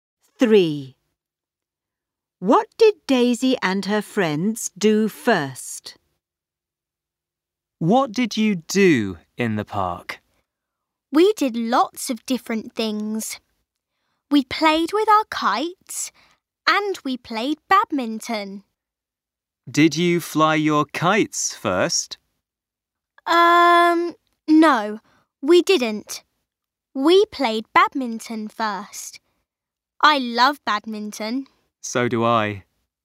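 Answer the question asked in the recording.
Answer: They played badminton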